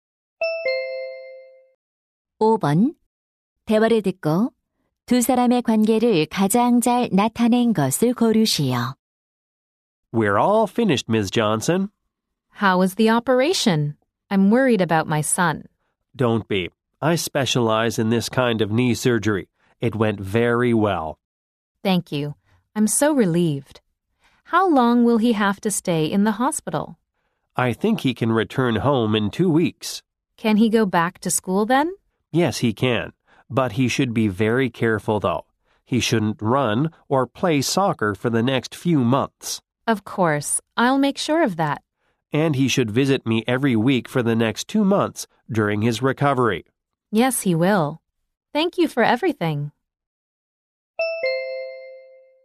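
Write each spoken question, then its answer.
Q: 대화를 듣고 두 사람의 관계를 가장 잘 나타낸 것을 고르시오.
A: 외과 의사 - 환자 보호자(어머니)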